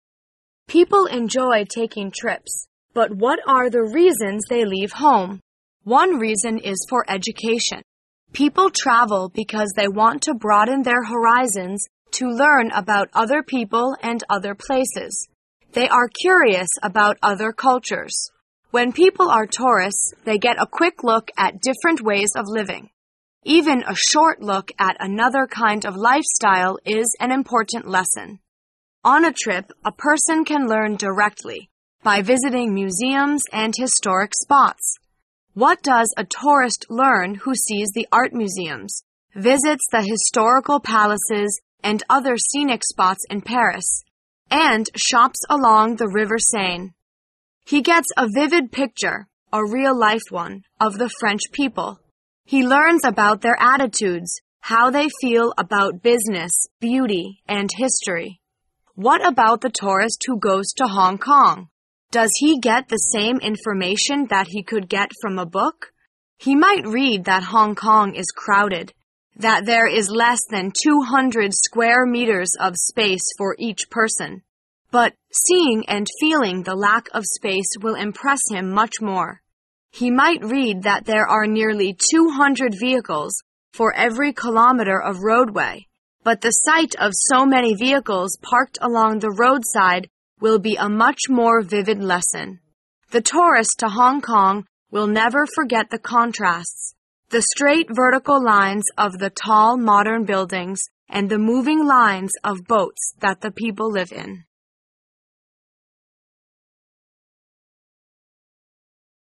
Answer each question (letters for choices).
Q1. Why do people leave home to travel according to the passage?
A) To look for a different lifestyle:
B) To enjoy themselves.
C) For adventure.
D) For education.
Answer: D

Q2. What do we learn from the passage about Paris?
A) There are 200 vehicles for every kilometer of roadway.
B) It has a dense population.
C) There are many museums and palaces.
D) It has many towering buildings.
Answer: C

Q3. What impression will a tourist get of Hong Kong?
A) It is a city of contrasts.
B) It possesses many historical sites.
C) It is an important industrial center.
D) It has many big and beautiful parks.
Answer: A

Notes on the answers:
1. 细节题。听到本文的第一句所提出的问题what are the reasons they leave home,发现这与17题题干一致,就要仔细听下文的解释:One reason is for education.这样就能知道本题的是[D]
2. 推理题。文章中提到巴黎时,把它和艺术博物馆、历代的宫殿以及其他景点联系在一起,问游客能从中学到什么,因此推断巴黎的博物馆和宫殿较多。
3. 细节题。What about the tourist who goes to Hong Kong? 由于这个问题涉及了香港,便把我们的注意力引向下文,文中说游客很难忘记香港城市中强烈的对比(never forget the contrast),这与[A]一致。

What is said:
A B C D D [解析] 17-20 People enjoy taking trips, but what are the reasons they leave home? (17[D]) One reason is for education. People travel because they want to broaden their horizons to learn about other people and other places. They are curious about other cultures. When people are tourists, they get a quick look at different ways of living. Even a short look at another kind of lifestyle is an important lesson. (20[B]) On a trip, a person can learn directly — by visiting museums and historic spots. (18[C]) What does a tourist learn who sees the art museums, visits the historical palaces and other scenic spots in Paris, and shops along the River Seine? He gets a vivid picture — a real-life one — of the French people. He learns about their attitudes, how they feel about business, beauty, and history. What about the tourist who goes to Hong Kong? Does he get the same information that he could get from a book? He might read that Hong Kong is crowded, that there is less than 200 square meters of space for each person, but seeing and feeling the lack of space will impress him much more. He might read that there are nearly 200 vehicles for every kilometer of roadway, but the sight of so many vehicles parked along the roadside will be a much more vivid lesson. (19[A]) The tourist to Hong Kong will never forget the contrasts — the straight vertical lines of the tall modern buildings and the moving lines of boats that the people live in.

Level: 专业四级